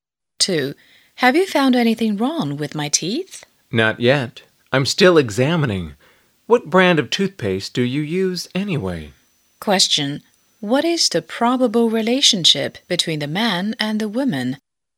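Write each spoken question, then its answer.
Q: What is the probable relationship between the man and the woman?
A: Dentist and patient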